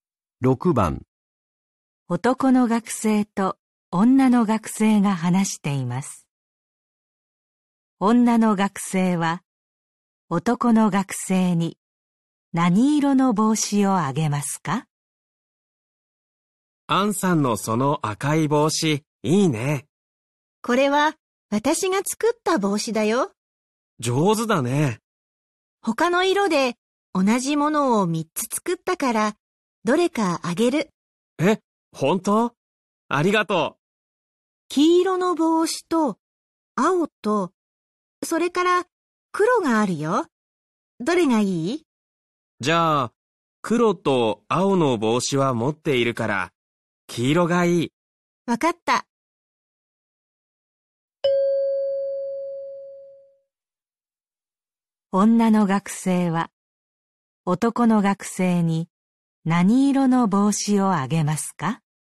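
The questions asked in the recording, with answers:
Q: 女の学生は男の学生に何色の帽子をあげますか?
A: 黄色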